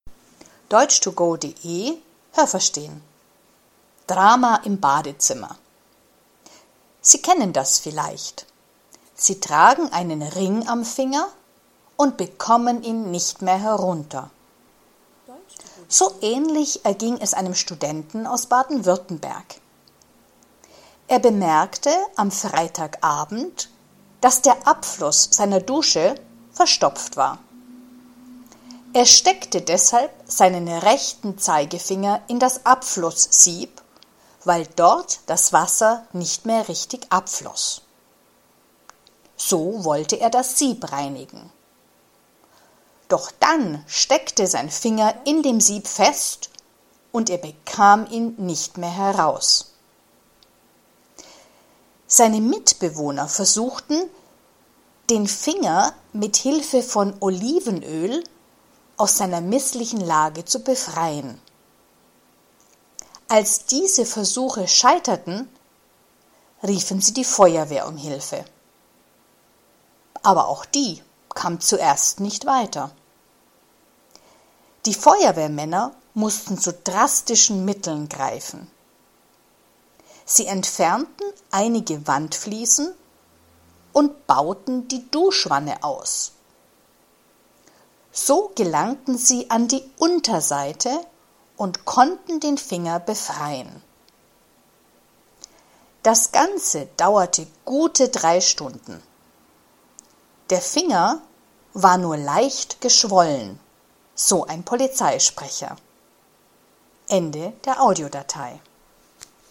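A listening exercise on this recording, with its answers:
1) Ein Student in Baden-Württemberg hatte ein Problem mit seinem Ring.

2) Das Wasser in seiner Badewanne floss nicht mehr richtig ab.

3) Er steckte seinen Zeigefinger in den Abfluss, weil er das Sieb reinigen wollte.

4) Er war nicht allein in der Wohnung.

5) Er konnte den Zeigefinger mit Olivenöl ein bisschen bewegen.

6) Die Feuerwehr kam lange nicht.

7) Die Feuerwehr konnte den Finger nur von unten befreien.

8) Die Feuerwehr musste einige Fliesen und die ganze Duschwanne entfernen.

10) Der Finger war nur leicht gebrochen.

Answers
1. falsch
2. falsch
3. richtig
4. richtig
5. falsch
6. falsch
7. richtig
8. richtig
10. falsch

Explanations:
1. Der erste Satz mit dem Ring ist nur ein Vergleich, ein Beispiel.
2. Es war keine Badewanne, sondern eine Dusche.
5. Im Text bekommen wir keine Informationen, ob er den Finger mit dem Olivenöl etwas bewegen konnte.
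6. Im Text heißt es: Die Polizei „kam zuerst nicht weiter". Das bedeutet, sie hatte am Anfang Probleme.
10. Der Finger war nicht gebrochen, sondern nur leicht geschwollen.

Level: B (mittel)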